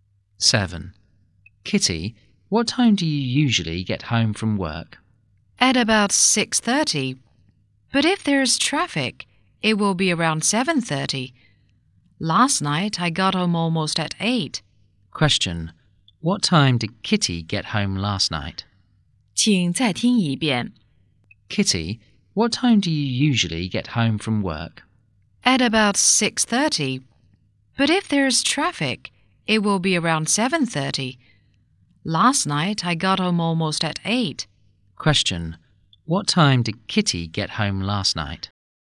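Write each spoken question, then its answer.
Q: What time did Kitty get home last night?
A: Almost at 8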